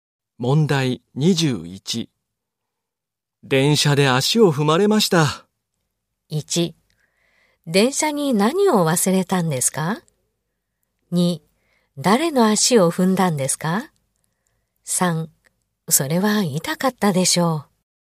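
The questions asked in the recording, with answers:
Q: 電車で足を踏まれました。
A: 3: それは痛かったでしょう。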